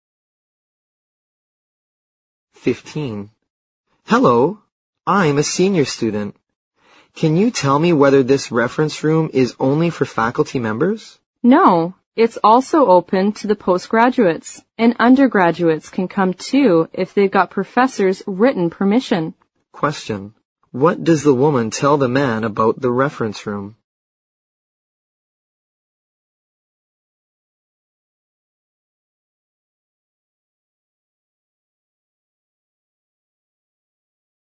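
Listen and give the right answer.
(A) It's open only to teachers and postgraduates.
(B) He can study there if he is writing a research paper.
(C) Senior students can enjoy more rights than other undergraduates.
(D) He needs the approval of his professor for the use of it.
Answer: (D) He needs the approval of his professor for the use of it.

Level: 六级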